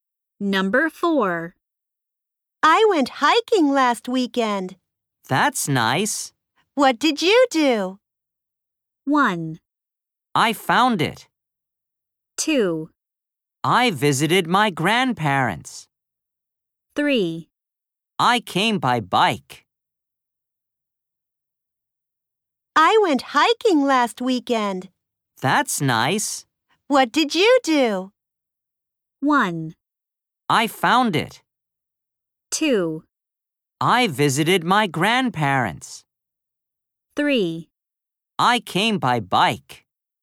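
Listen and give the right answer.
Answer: 2: I visited my grandparents.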